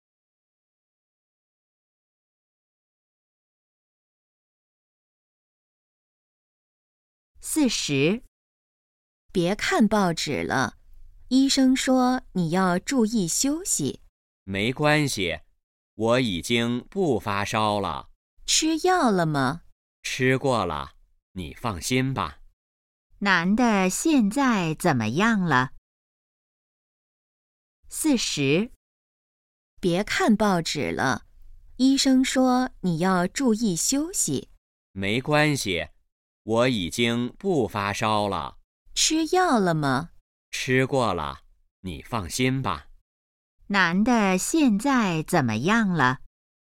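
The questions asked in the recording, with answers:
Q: 男的现在怎么样了?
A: 已经不发烧了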